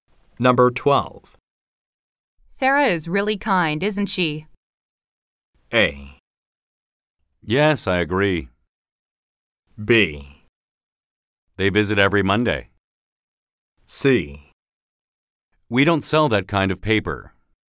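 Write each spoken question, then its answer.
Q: Sarah is really kind, isn't she?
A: A: Yes, I agree.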